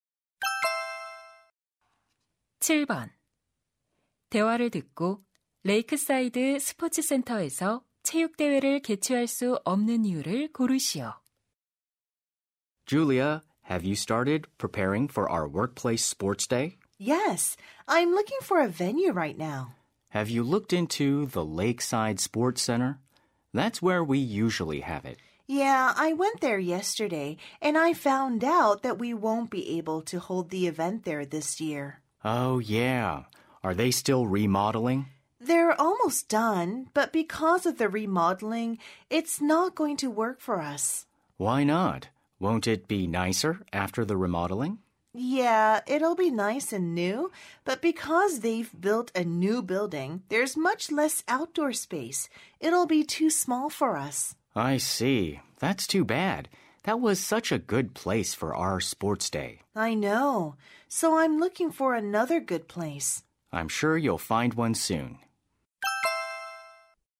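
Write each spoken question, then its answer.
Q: 대화를 듣고 레이크사이드 스포츠 센터에서 체육대회를 개최할 수 없는 이유를 고르시오.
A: 새 건물을 지어 야외 공간이 너무 좁아져서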